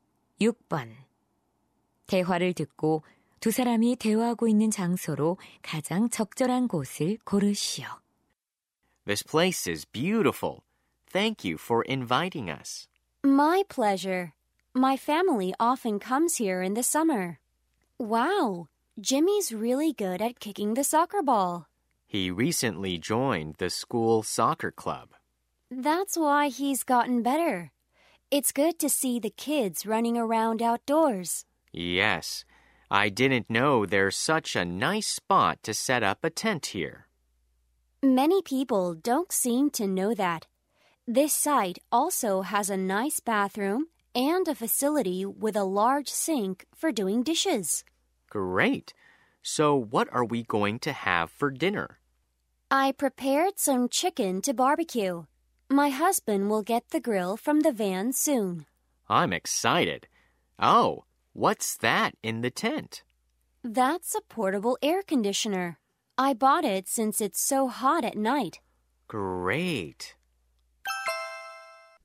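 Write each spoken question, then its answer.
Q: 대화를 듣고 두 사람이 대화하고 있는 장소로 가장 적절한 곳을 고르시오.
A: 캠핑장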